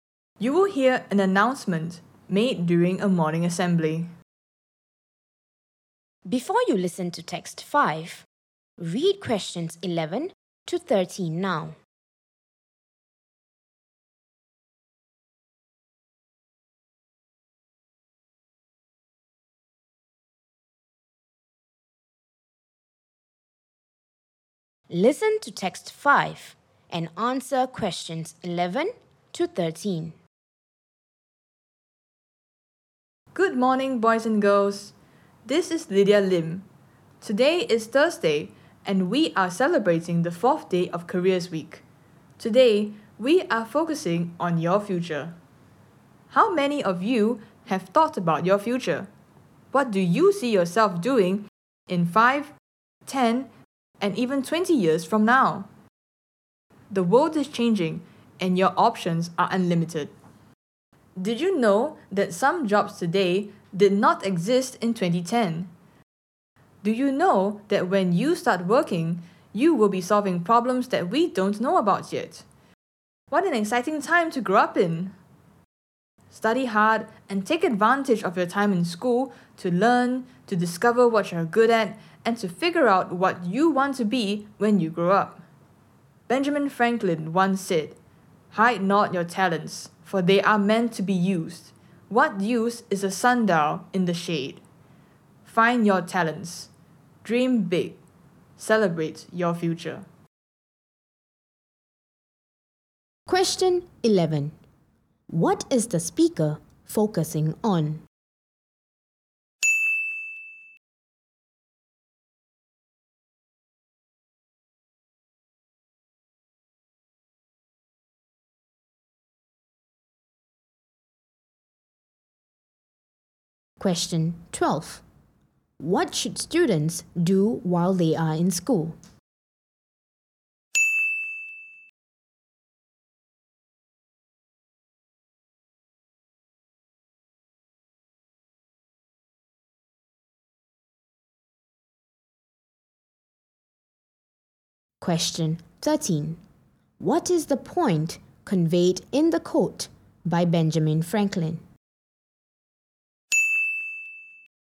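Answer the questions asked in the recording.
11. Students' future
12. Study hard, learn, discover what they're good at and figure out what they want to be
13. Talents should be found and used, not hidden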